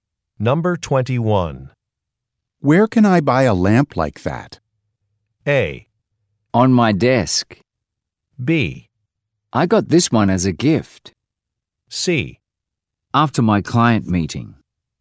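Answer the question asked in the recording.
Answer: B: I got this one as a gift.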